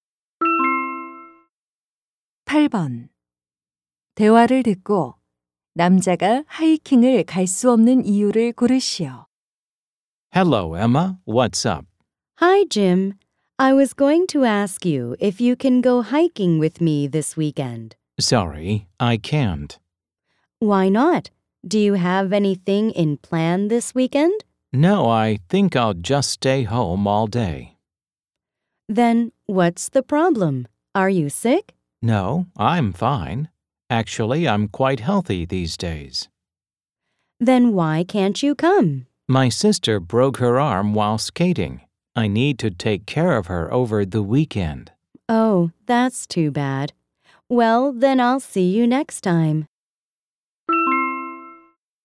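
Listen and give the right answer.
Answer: 팔이 부러진 여동생을 돌봐야 해서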